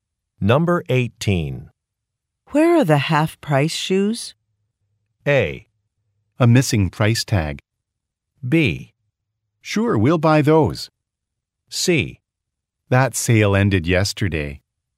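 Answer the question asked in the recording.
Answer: C: That sale ended yesterday.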